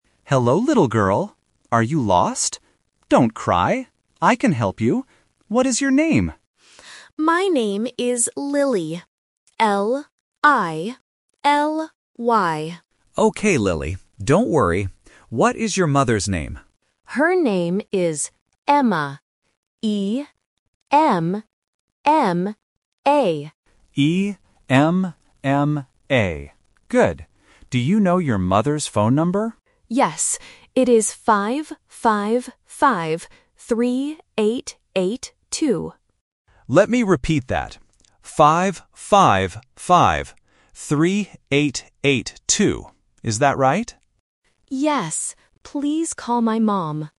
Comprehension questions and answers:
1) How do you spell the mother's name?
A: E-M-M-A

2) What is the mother's phone number?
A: 555-3882

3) Who is the girl looking for?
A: Her mother

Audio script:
Security Guard: Hello, little girl. Are you lost? Don't cry. I can help you. What is your name?
Child: (sniffling) My name is Lily. L-I-L-Y.
Security Guard: Okay, Lily. Don't worry. What is your mother's name?
Child: Her name is Emma. E-M-M-A.
Security Guard: E-M-M-A. Good. Do you know your mother's phone number?